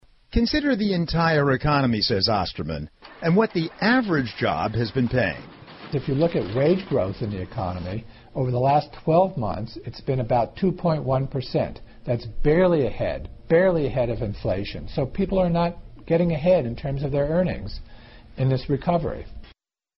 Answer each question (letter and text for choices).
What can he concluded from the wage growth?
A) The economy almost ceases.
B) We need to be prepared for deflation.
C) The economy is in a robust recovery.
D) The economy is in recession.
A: D) The economy is in recession.

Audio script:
Reporter: "Consider the entire economy", say Osterman, "and what the average job has been paying."
Interviewee: If you look at wage growth in the economy, over the last 12 months, it's been about 2.1 percent. That's barely ahead, barely ahead of inflation, so people are not going ahead in terms of their earnings in this recovery.